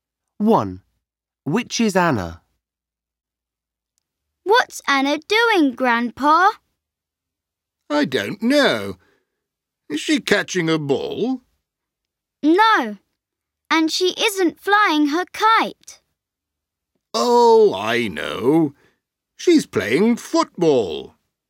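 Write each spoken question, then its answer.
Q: Which is Anna?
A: She's playing football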